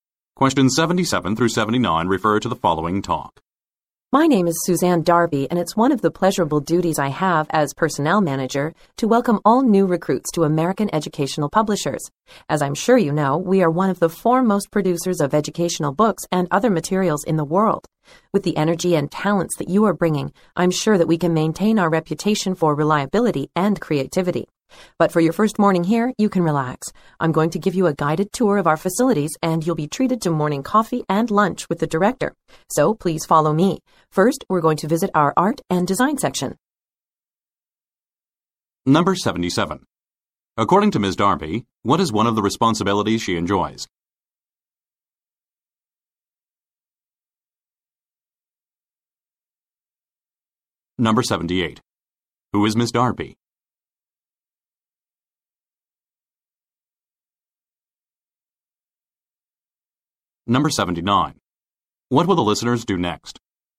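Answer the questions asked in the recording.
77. Welcoming new recruits
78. The personnel manager
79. Take a guided tour, starting with the art and design section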